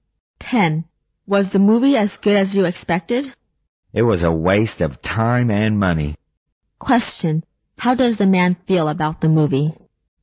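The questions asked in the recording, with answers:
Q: How does the man feel about the movie?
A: Disappointed; it was a waste of time and money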